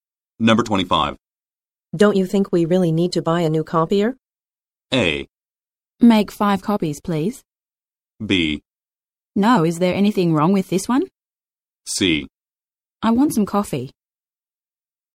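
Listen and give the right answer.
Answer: B: No, is there anything wrong with this one?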